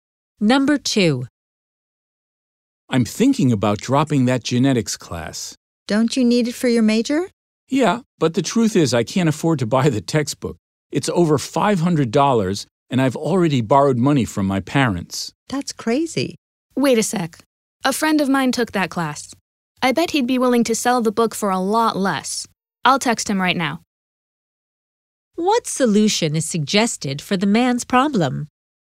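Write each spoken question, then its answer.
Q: What solution is suggested for the man's problem?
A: Buy the textbook cheaply from the woman's friend who took the class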